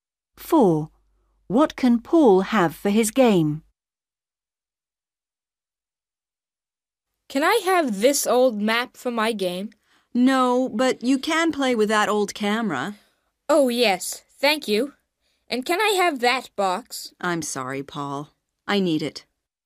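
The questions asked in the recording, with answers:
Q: What can Paul have for his game?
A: the old camera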